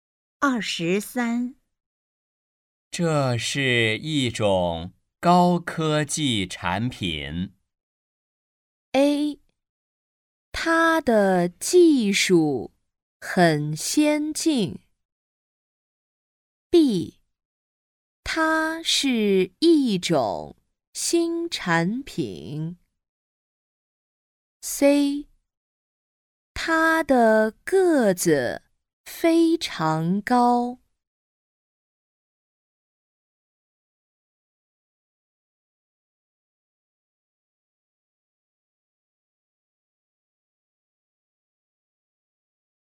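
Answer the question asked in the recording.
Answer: A: 它的技术很先进。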